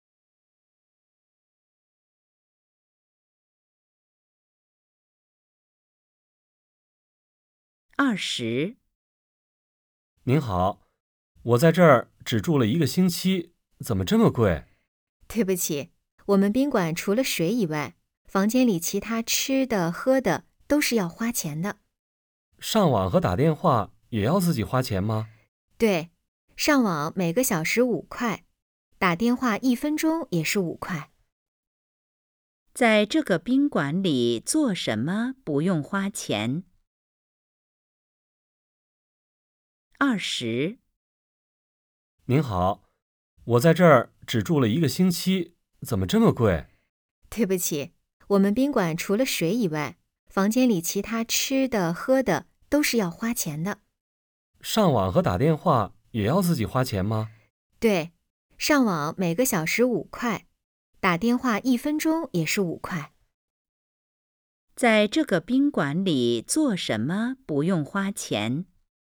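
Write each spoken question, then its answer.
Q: 在这个宾馆里做什么不用花钱?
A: 喝水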